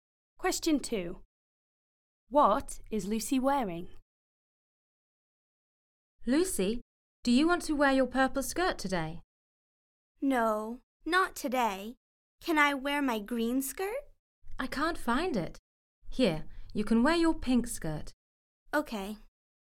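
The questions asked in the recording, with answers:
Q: What is Lucy wearing?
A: Her pink skirt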